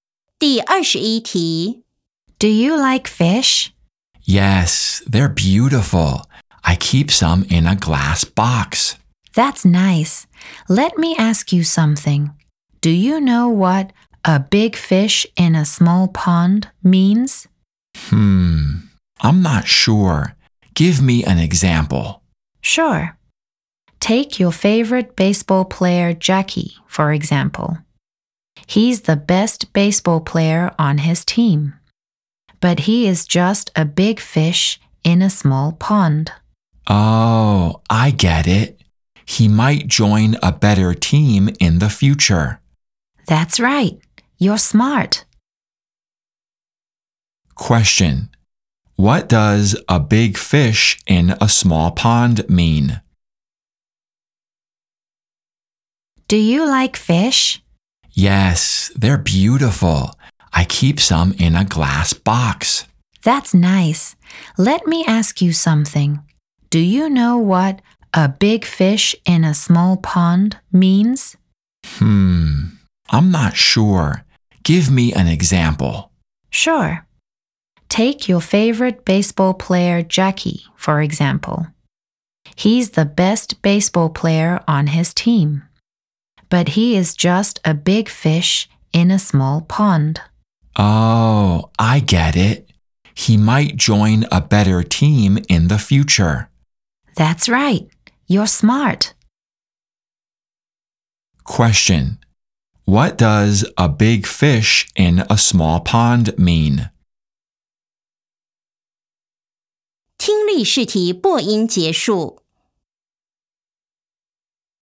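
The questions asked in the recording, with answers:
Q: What does a big fish in a small pond mean?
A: Someone who is the best in a small group but could do better somewhere bigger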